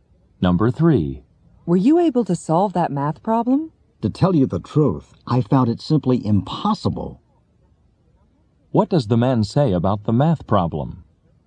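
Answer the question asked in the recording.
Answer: He couldn't solve it; it was impossible.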